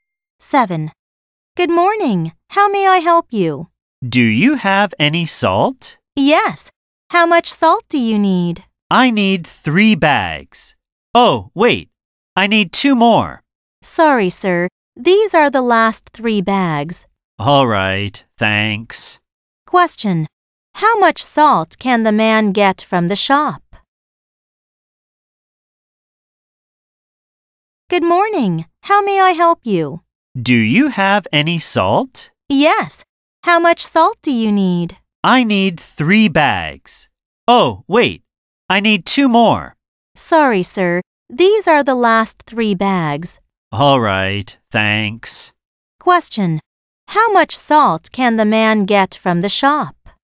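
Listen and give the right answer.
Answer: Three bags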